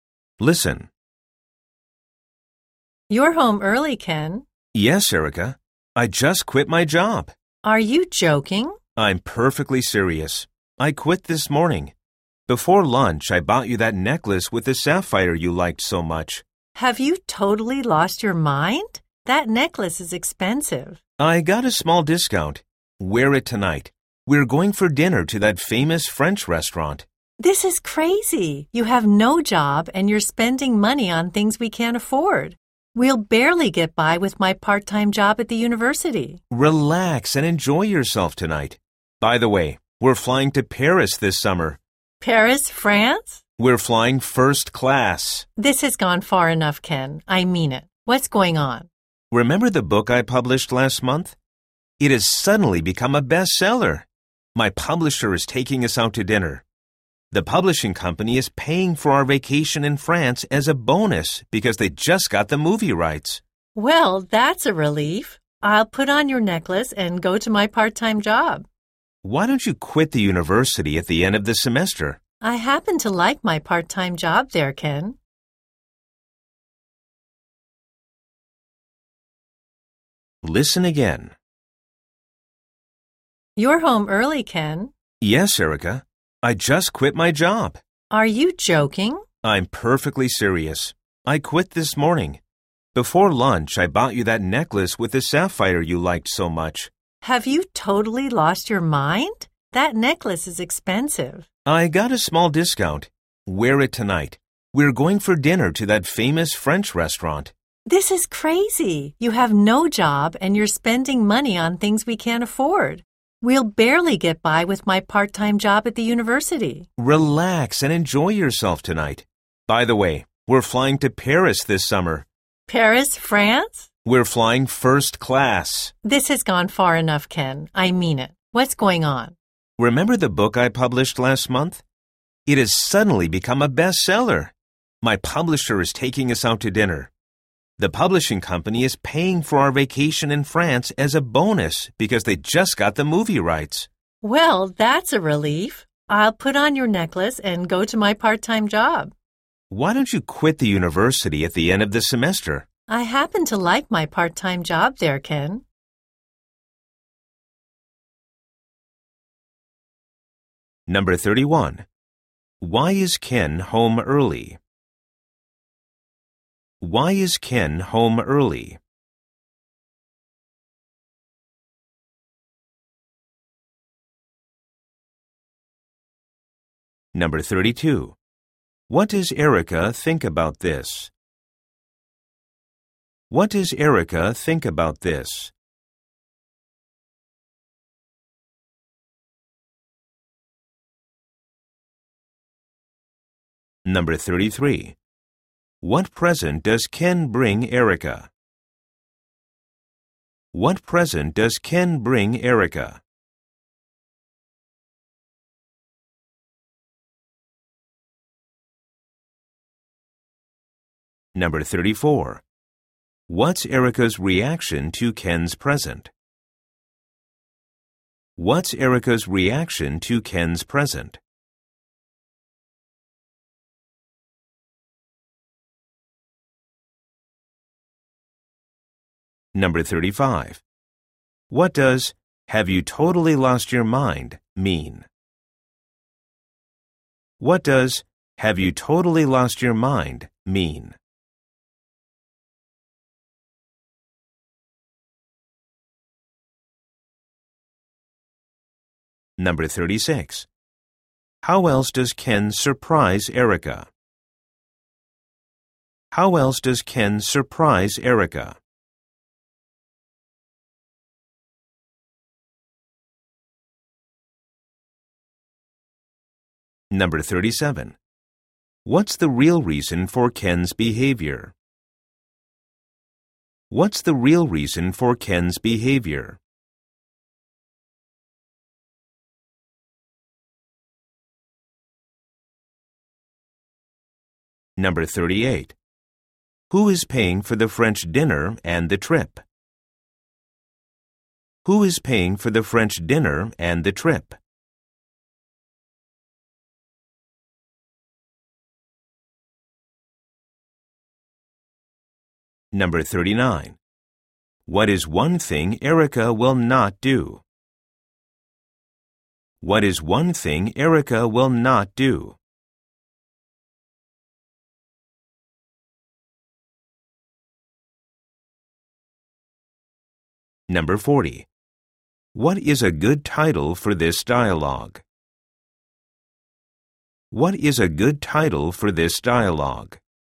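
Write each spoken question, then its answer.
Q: Why is Ken home early?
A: He quit his job

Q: What present does Ken bring Erica?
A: A sapphire necklace

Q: What's Erica's reaction to Ken's present?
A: She is upset because it is expensive

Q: What does "have you totally lost your mind" mean?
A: Are you crazy?

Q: How else does Ken surprise Erica?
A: They are flying first class to Paris this summer

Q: What's the real reason for Ken's behavior?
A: His book suddenly became a bestseller

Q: Who is paying for the French dinner and the trip?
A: Ken's publisher

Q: What is one thing Erica will not do?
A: Quit her part-time job at the university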